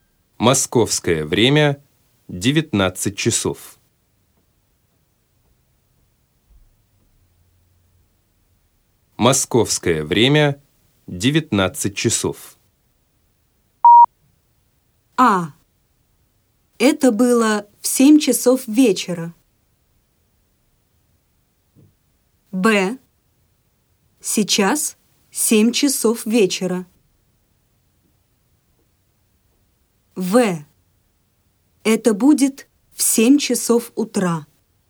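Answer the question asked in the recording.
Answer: Б: Сейчас 19:00.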